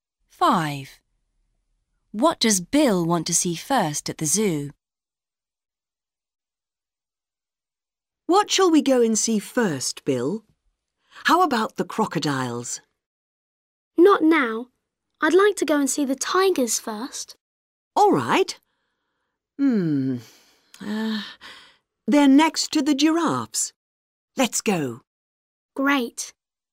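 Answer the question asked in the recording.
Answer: the tigers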